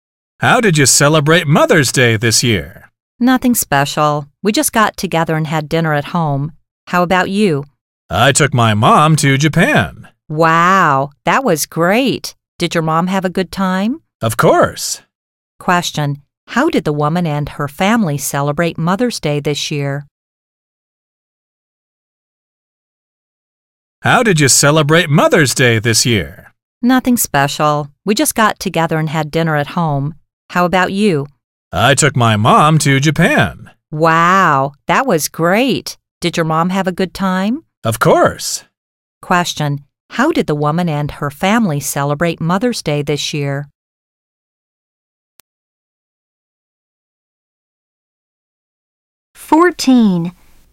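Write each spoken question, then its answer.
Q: How did the woman and her family celebrate Mother's Day this year?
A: They got together and had dinner at home.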